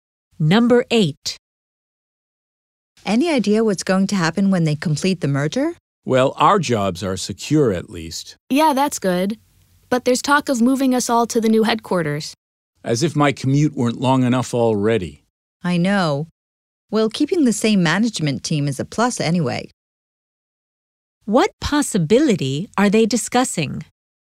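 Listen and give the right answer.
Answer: Being moved to the new headquarters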